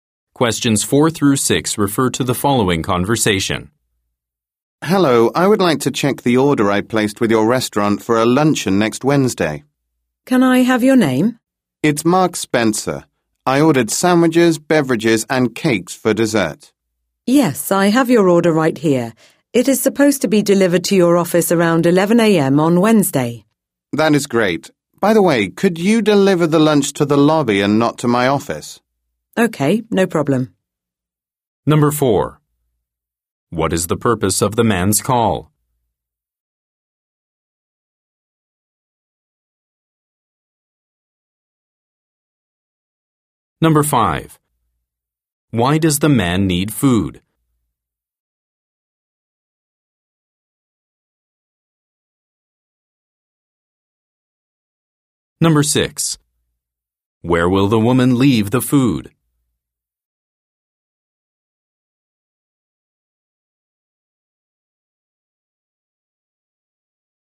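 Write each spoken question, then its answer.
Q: What is the purpose of the man's call?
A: To check his order

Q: Why does the man need food?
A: For a luncheon next Wednesday

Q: Where will the woman leave the food?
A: In the lobby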